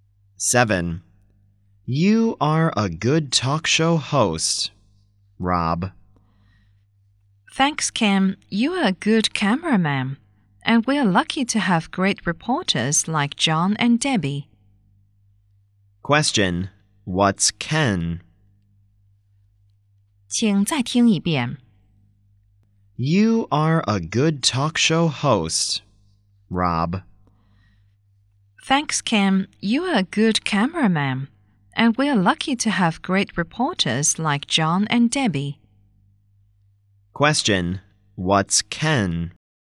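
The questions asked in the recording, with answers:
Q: Question, what's Ken?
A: A cameraman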